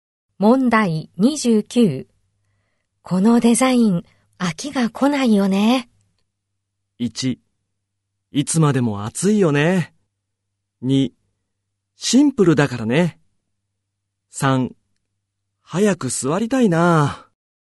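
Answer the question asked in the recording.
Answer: 2: シンプルだからね。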